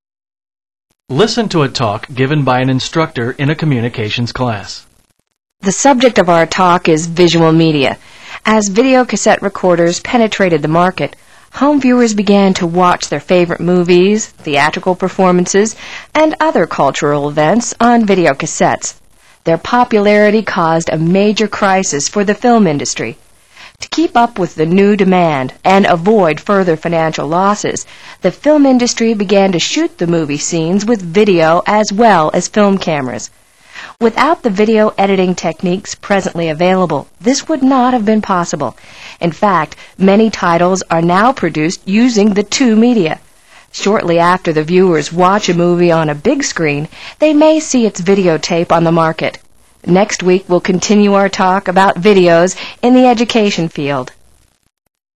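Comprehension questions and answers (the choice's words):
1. How did the film industry respond to Video Cassette Recorders?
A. It produced film and video versions of the features.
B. It reduced the recording of cultural events.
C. It discontinued its three dimensional movies.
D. It borrowed money from private investors.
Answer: It produced film and video versions of the features.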